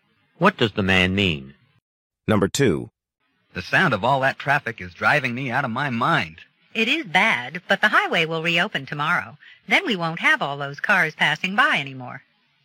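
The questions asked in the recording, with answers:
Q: What does the woman imply?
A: The traffic noise will stop soon, once the highway reopens tomorrow.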